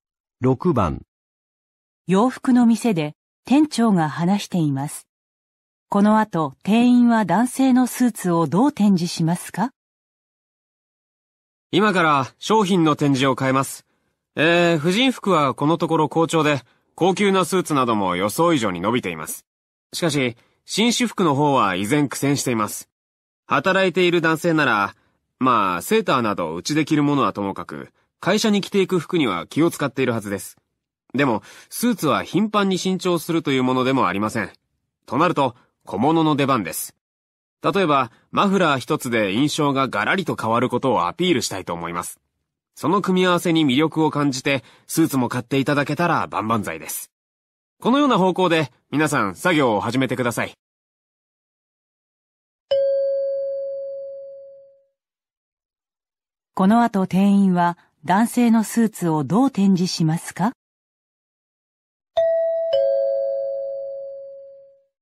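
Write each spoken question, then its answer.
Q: この後店員は男性のスーツをどう展示しますか?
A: マフラーなどの小物と組み合わせて展示する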